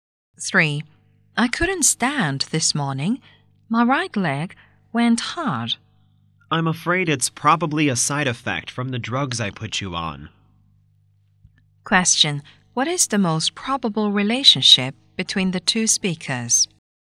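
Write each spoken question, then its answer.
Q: What is the most probable relationship between the two speakers?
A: Patient and doctor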